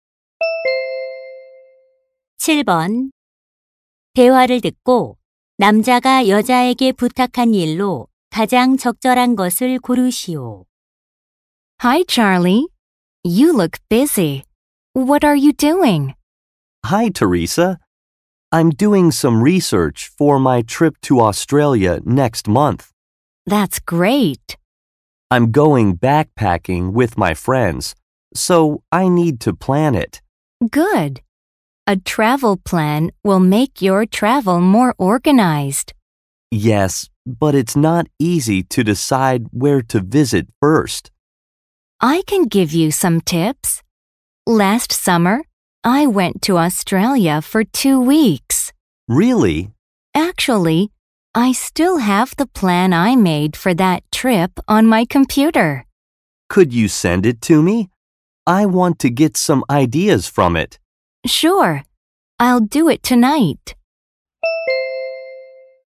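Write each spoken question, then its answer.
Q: 대화를 듣고 남자가 여자에게 부탁한 일로 가장 적절한 것을 고르시오.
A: 여행 계획서 보내 주기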